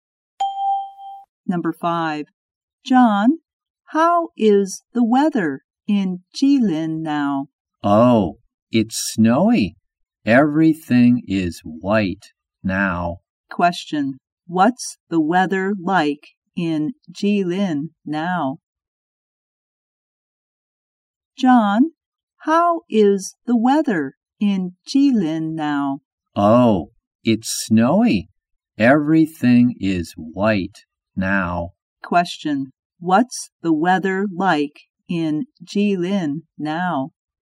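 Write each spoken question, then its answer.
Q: Question, what's the weather like in Jilin now?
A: Snowy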